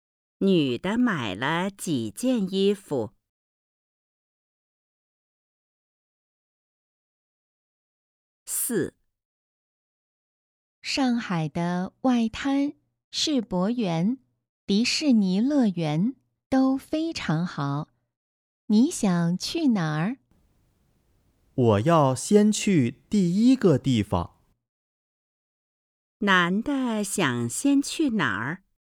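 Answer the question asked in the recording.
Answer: 外滩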